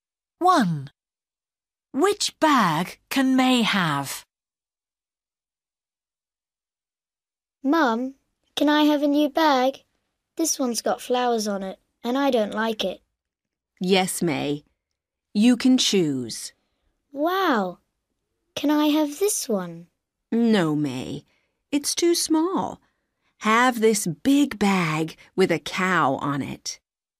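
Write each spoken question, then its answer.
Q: Which bag can May have?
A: the big bag with a cow on it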